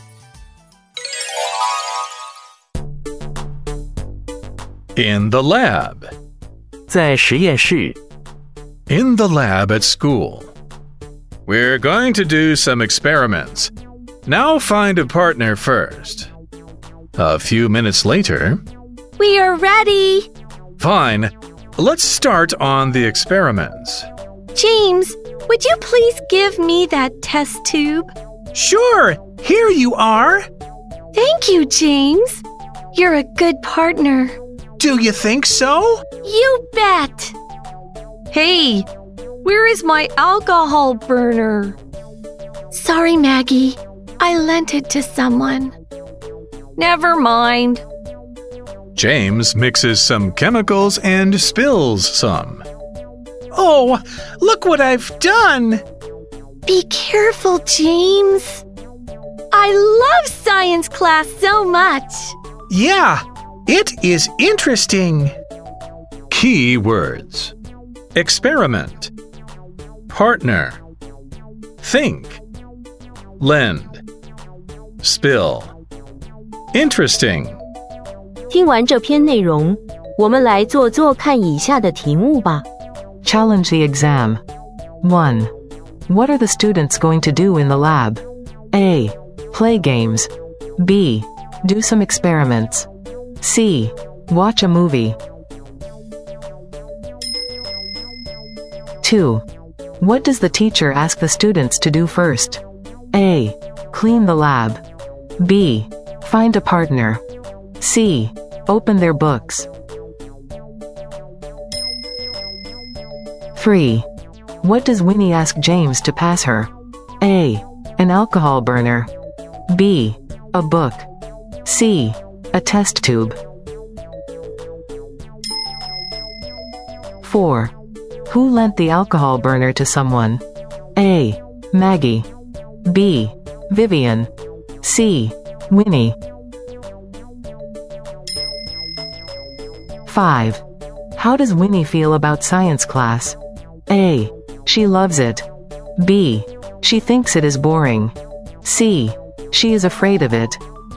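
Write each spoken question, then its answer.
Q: What are the students going to do in the lab?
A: B: Do some experiments.

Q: What does the teacher ask the students to do first?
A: B: Find a partner.

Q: What does Winnie ask James to pass her?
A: C: A test tube.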